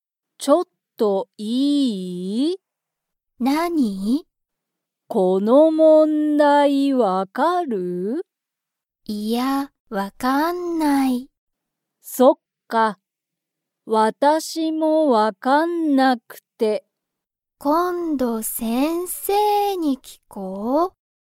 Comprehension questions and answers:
Comprehension Quiz (Skip if you don't understand the conversation yet)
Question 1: ナオミは、その問題(もんだい)が分(わ)かりますか?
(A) はい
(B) いいえ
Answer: いいえ

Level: Level 1

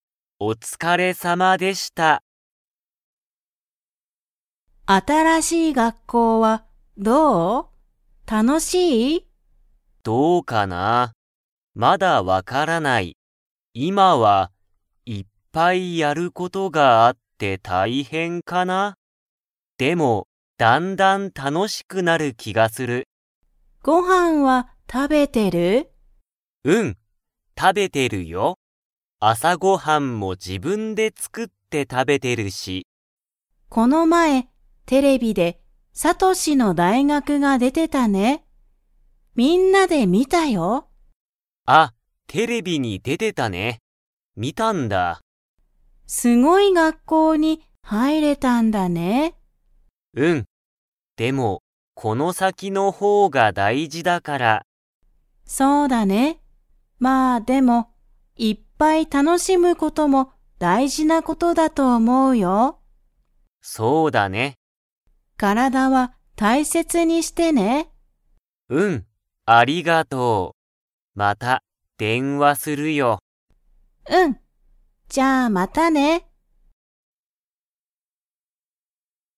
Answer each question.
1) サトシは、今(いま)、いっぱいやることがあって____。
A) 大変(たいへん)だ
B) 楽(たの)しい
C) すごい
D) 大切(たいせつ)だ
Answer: 大変(たいへん)だ

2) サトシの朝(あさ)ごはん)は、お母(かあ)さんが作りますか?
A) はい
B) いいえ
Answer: いいえ

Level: Level 2

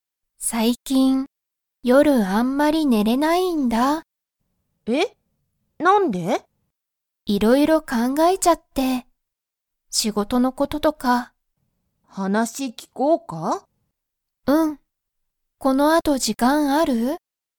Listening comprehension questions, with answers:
Comprehension Quiz (Skip if you don't understand the conversation yet)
エリは、最近(さいきん)____。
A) 仕事(しごと)がたくさんある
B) 話(はなし)を聞(き)く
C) 時間(じかん)が全然(ぜんぜん)ない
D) 夜(よる)あんまり寝(ね)れない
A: 夜(よる)あんまり寝(ね)れない

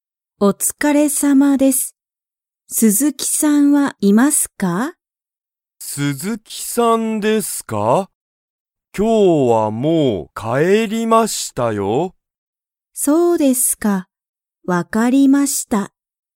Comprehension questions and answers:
鈴木(すずき)さんはまだいますか?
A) はい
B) いいえ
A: いいえ

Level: Level 1

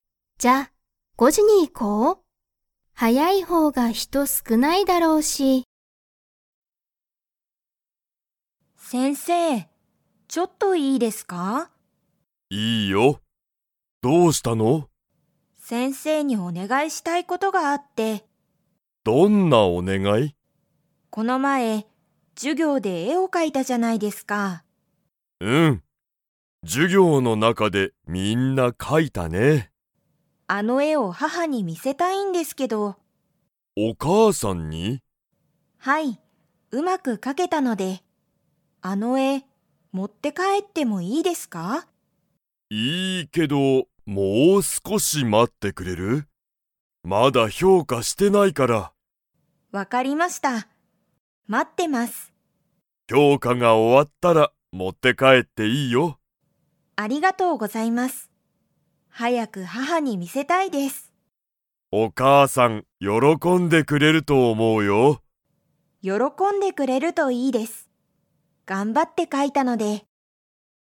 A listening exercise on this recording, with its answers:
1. この前まえ、ユウコは で絵えを描かいた。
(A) 外そと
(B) 家いえ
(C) 授業じゅぎょう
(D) お店みせ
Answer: 授業じゅぎょう

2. ユウコは絵えを今いますぐ持もって帰かえれますか?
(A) はい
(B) いいえ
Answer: いいえ

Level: Level 3

